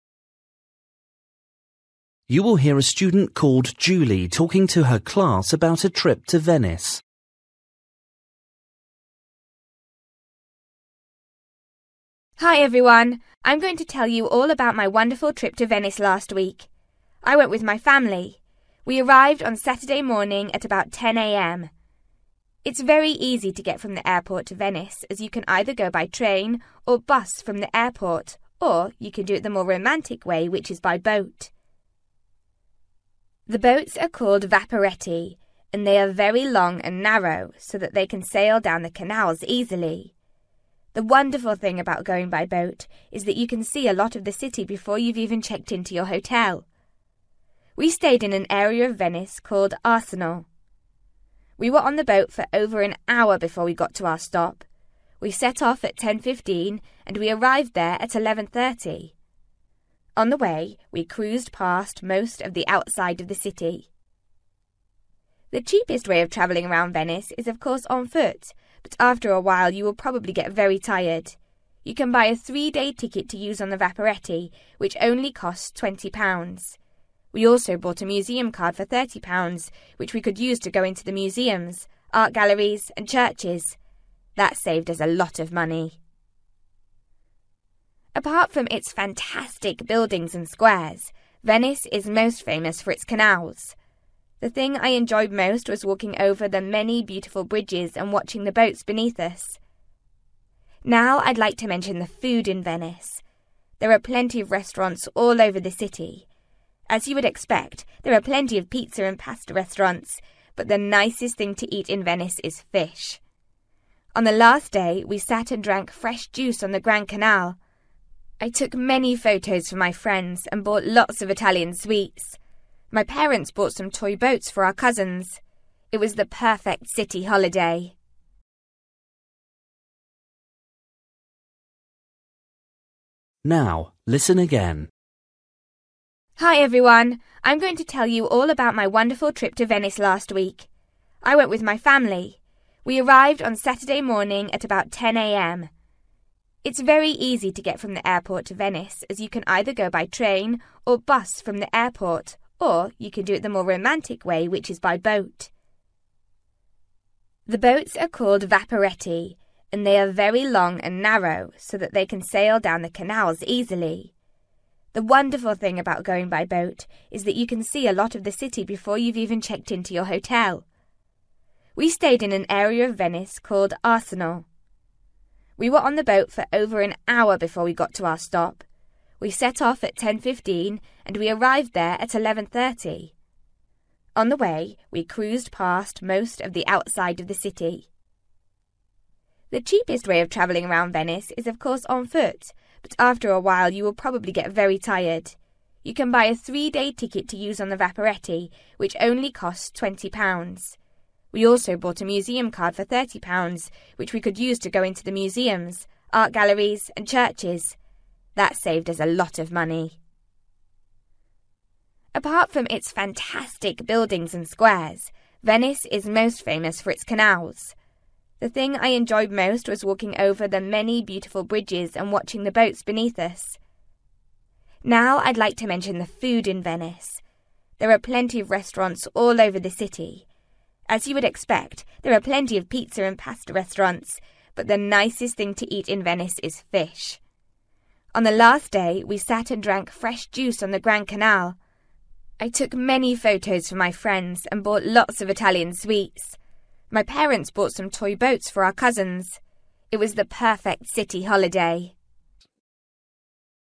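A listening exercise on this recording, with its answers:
For each question, write the correct answer in the gap. Write one or two words or a number or a date or a time. You will hear a student called Julie talking to her class about her trip to Venice.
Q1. You can use bus, (1) or boat to go to Venice from the airport.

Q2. Julie and her parents started their journey to Arsenale at (2) .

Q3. The museum card costs (3) .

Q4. Julie's favourite place to walk was over (4) .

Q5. The best food to eat in Venice is (5) .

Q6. Julie's parents bought some (6) for her relatives.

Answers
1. train
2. 10:15
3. £30
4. bridges
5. fish
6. toy boats

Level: Luyện nghe trình độ B1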